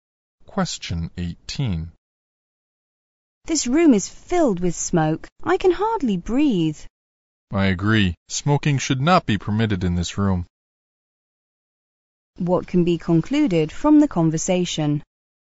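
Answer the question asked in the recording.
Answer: Smoking should not be allowed in the room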